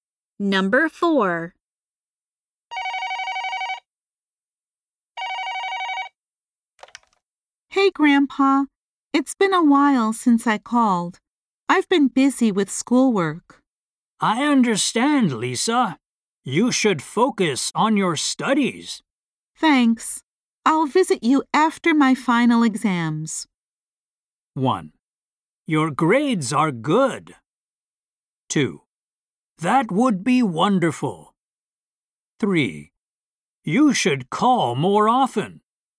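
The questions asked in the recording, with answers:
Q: Thanks. I'll visit you after my final exams.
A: 2: That would be wonderful.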